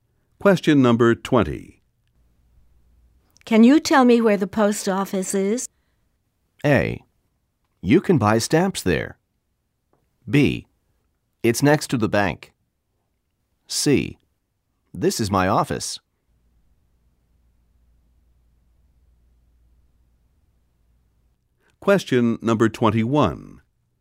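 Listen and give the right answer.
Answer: B: It's next to the bank.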